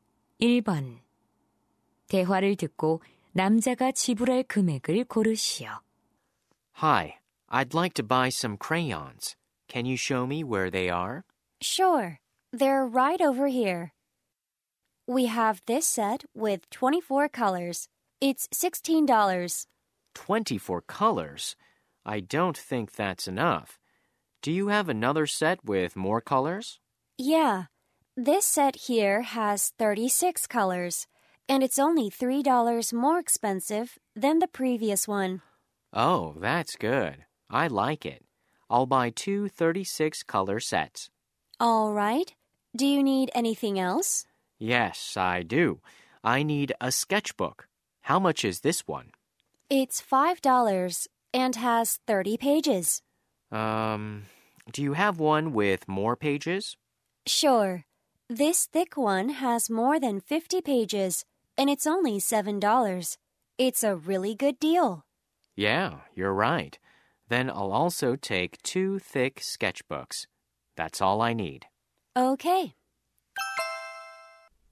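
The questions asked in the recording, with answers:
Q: 대화를 듣고 남자가 지불할 금액을 고르시오.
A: $52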